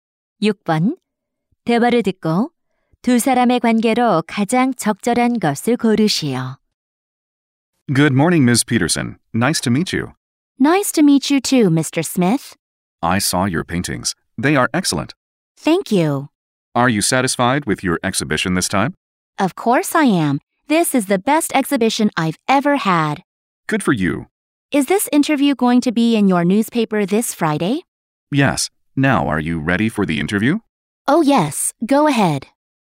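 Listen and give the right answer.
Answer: 화가 – 기자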